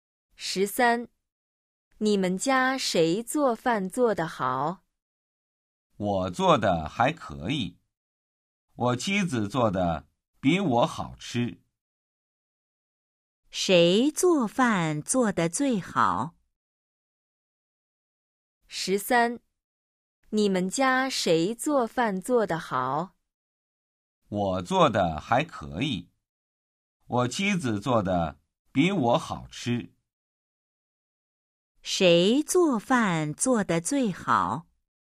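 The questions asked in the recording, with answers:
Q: 谁做饭做得最好?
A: 妻子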